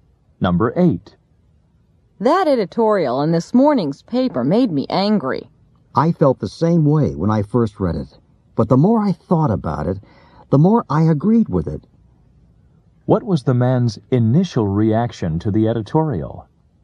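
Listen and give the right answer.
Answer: It made him angry.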